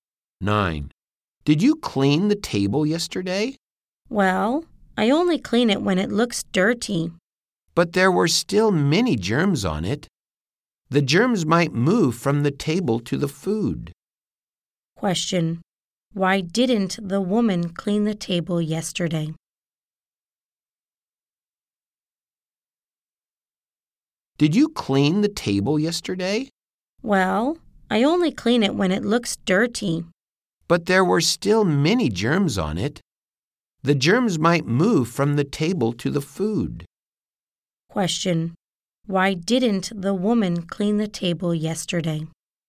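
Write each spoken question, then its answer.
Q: Question. Why didn't the woman clean the table yesterday?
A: It didn't look dirty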